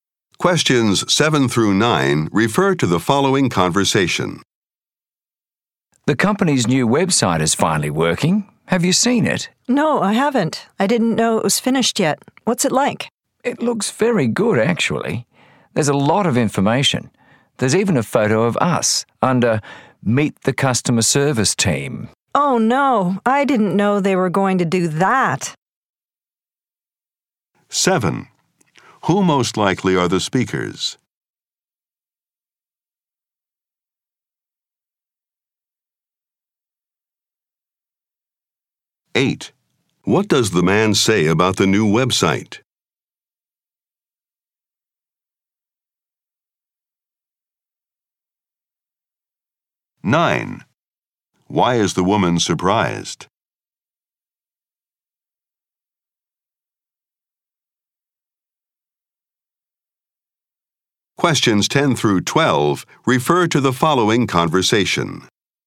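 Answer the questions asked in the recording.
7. Members of the customer service team
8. It looks very good and has a lot of information
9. There is a photo of them on the website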